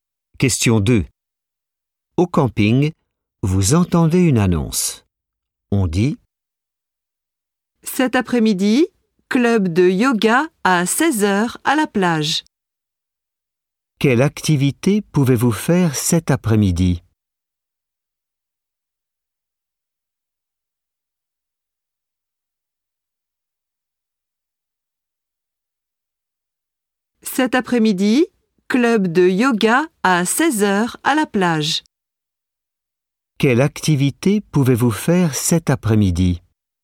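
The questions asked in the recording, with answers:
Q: Quelle activité pouvez-vous faire cet après-midi?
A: du yoga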